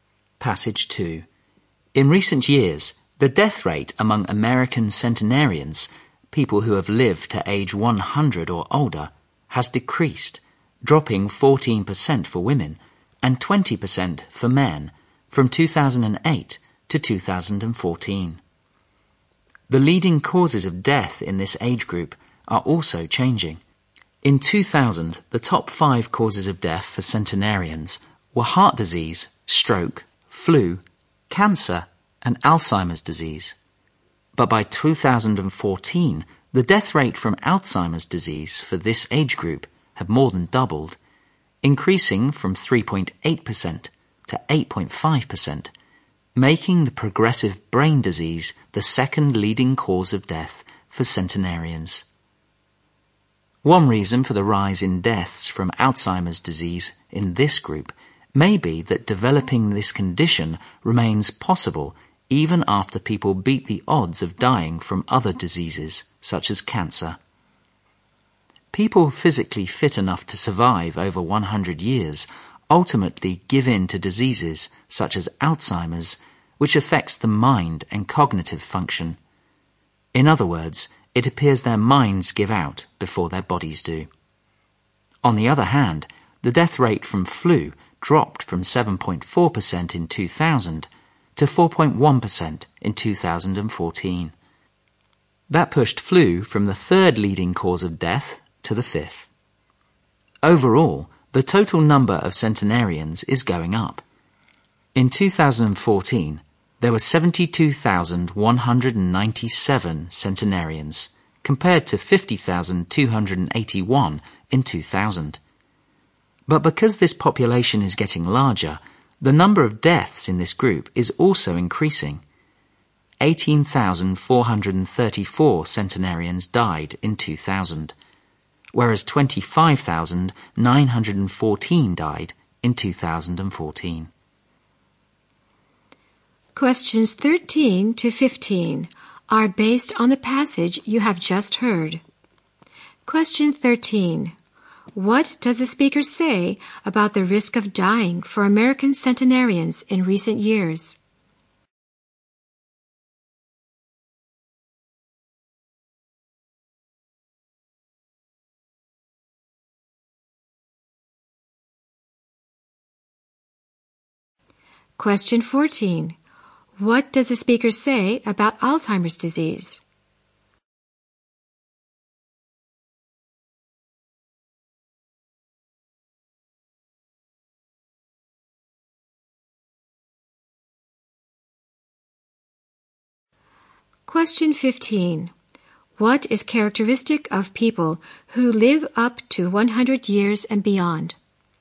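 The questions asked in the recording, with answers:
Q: What does the speaker say about the risk of dying for American centenarians in recent years?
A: It has decreased.

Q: What does the speaker say about Alzheimer's disease?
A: It became the second leading cause of death for centenarians.

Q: What is characteristic of people who live up to 100 years and beyond?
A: Their minds give out before their bodies do.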